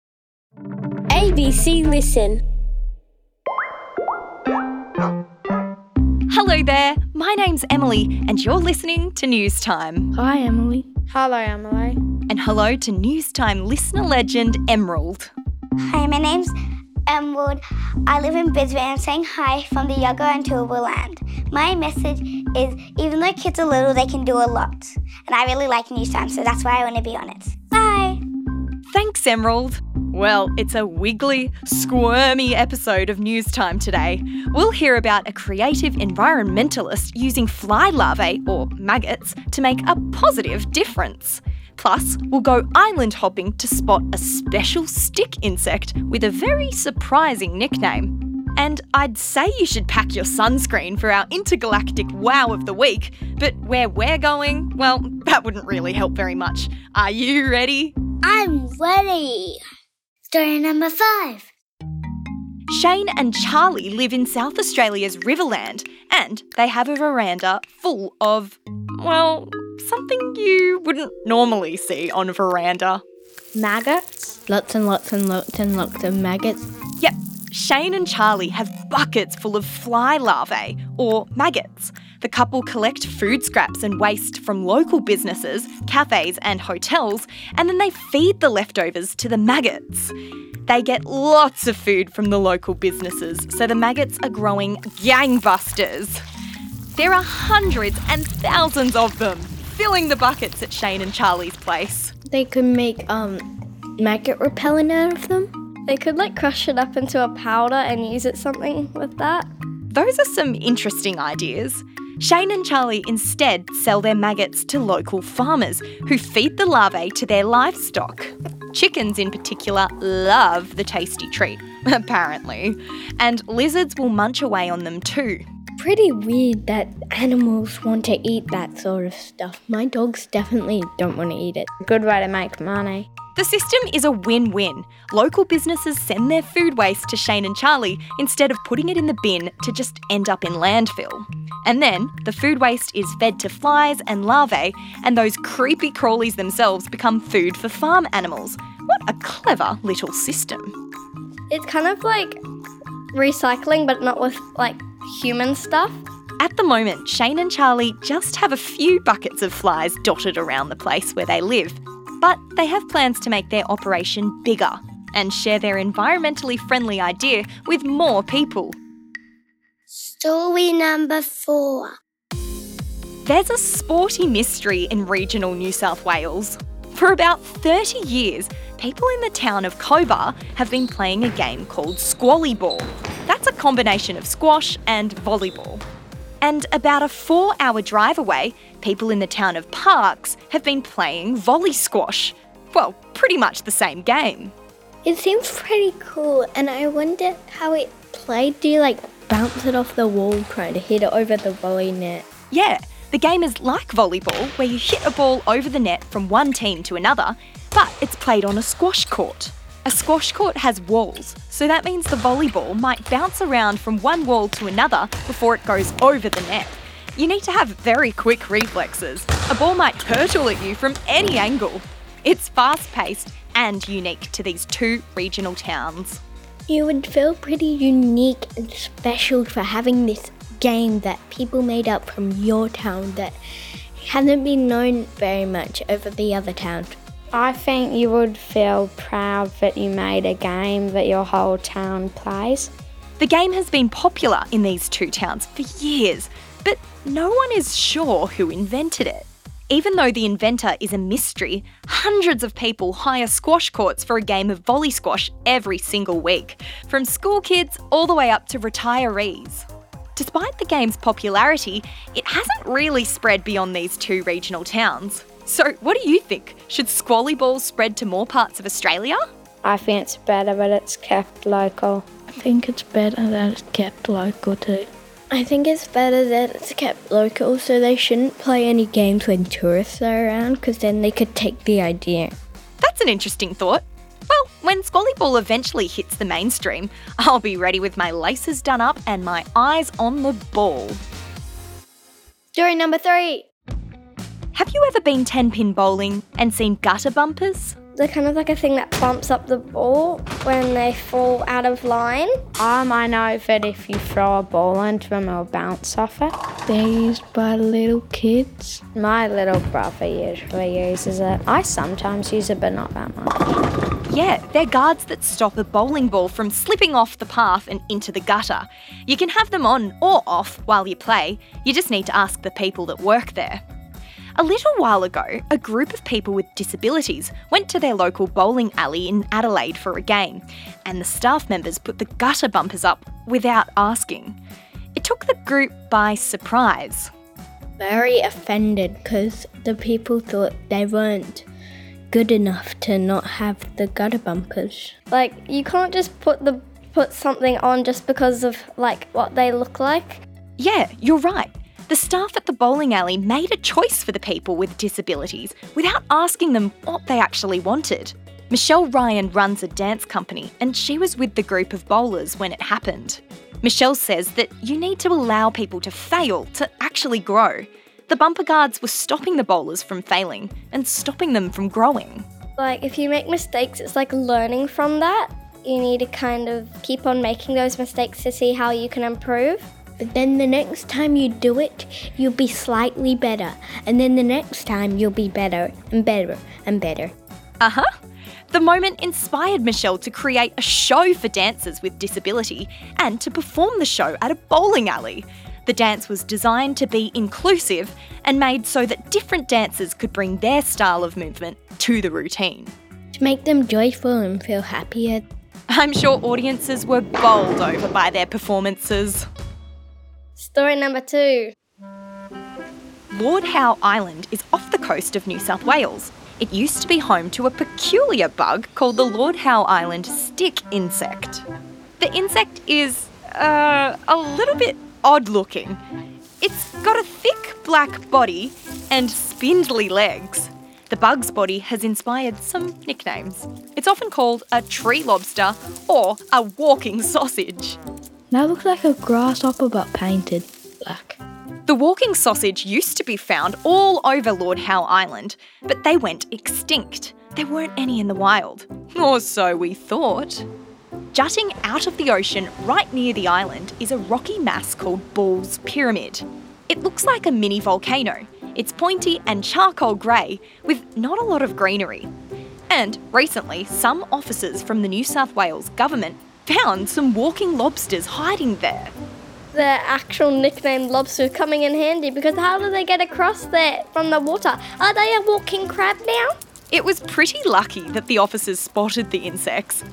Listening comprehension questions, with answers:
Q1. What do Shane and Charli feed their fly larvae?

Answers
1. Food waste from local businesses.